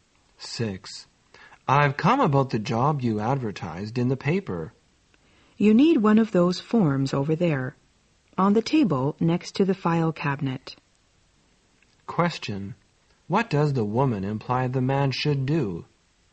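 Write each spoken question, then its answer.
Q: What does the woman imply the man should do?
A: Fill out an application form from the table.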